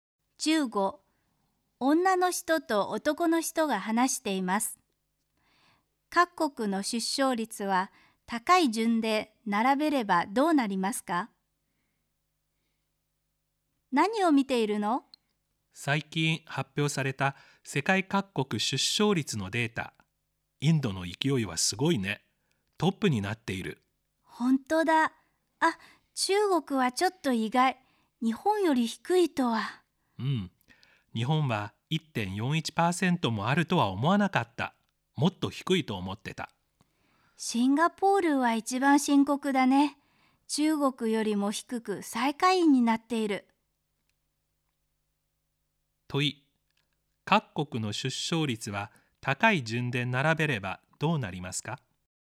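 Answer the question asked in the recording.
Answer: インド、日本、中国、シンガポール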